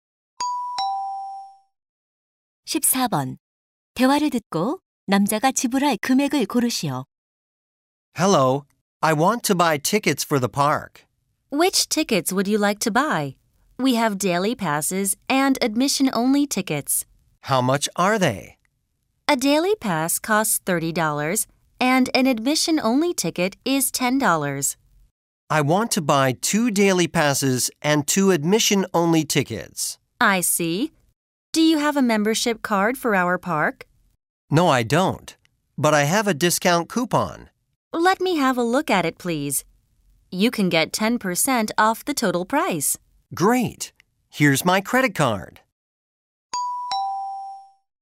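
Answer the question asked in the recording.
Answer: $72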